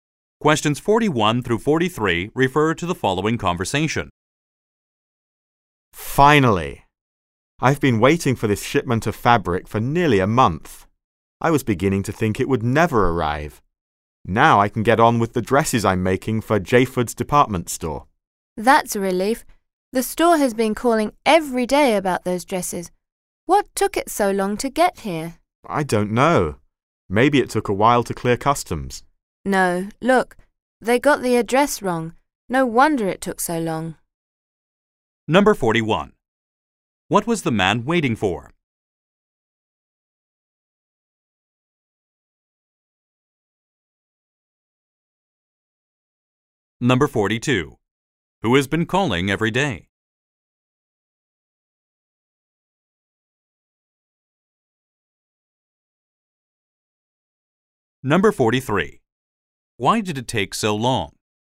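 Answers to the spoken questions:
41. A shipment of fabric
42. Jayford's department store
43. The address was wrong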